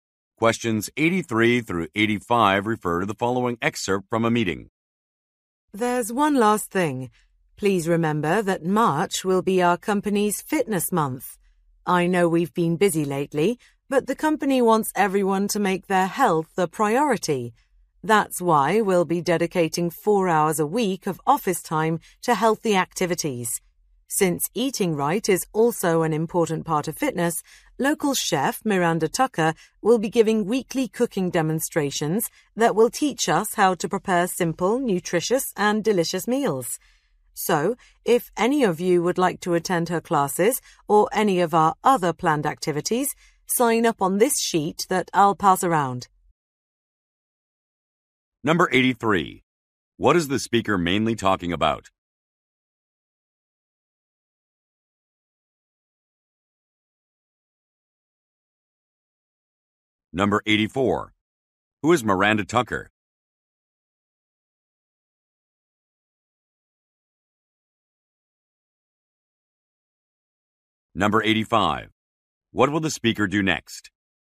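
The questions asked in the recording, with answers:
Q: What is the speaker mainly talking about?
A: The company's fitness month

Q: Who is Miranda Tucker?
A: A local chef

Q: What will the speaker do next?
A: Pass around a sign-up sheet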